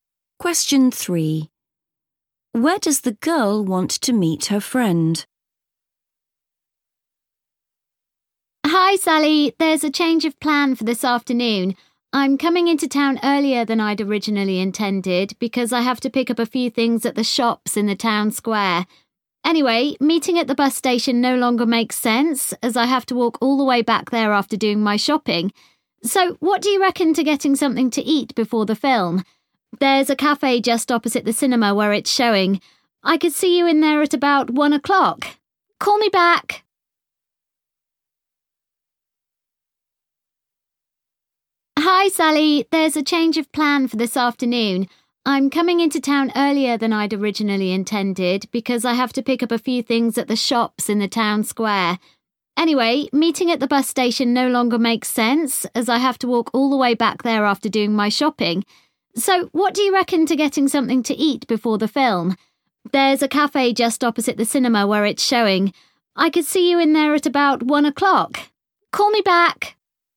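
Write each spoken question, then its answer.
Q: Where does the girl want to meet her friend?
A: at the cafe opposite the cinema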